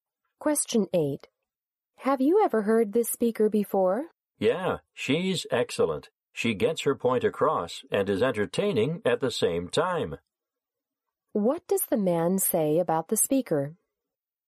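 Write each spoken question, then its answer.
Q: What does the man say about the speaker?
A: She is excellent: she gets her point across and is entertaining.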